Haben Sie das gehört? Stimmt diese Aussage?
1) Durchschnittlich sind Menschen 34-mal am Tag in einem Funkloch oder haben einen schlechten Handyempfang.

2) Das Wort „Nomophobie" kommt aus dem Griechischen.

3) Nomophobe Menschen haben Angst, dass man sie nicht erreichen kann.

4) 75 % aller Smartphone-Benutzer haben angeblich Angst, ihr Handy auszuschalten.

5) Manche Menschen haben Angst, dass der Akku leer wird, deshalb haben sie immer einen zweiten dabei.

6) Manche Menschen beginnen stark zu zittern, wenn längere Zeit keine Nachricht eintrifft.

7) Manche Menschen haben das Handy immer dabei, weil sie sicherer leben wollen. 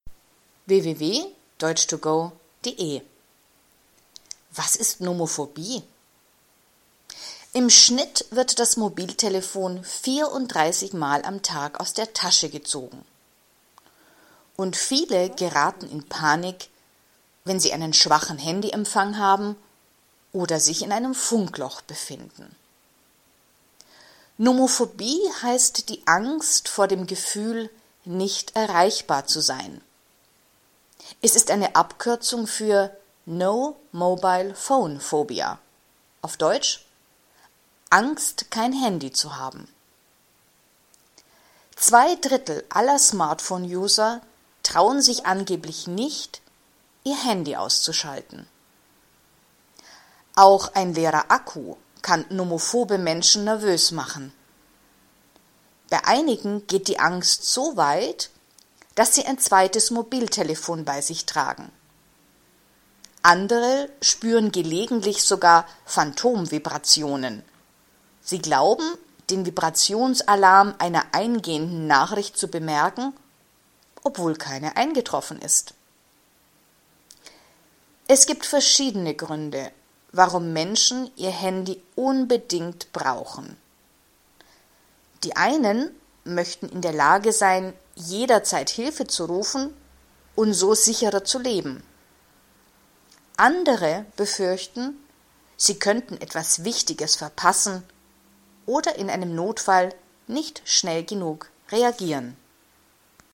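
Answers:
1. falsch
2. falsch
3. richtig
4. falsch
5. falsch
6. falsch
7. richtig

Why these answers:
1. 34-mal am Tag benutzen Menschen im Durchschnitt ihr Mobiltelefon.
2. Das Wort ist eine Abkürzung des englischen Begriffs „No Mobile Phone Phobia".
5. Sie haben keinen zweiten Akku dabei, sondern ein zweites Mobiltelefon.
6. Sie zittern nicht selbst, sondern sie hören den Vibrationsalarm ihres Handys, obwohl das Handy nicht vibriert.

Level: B (mittel)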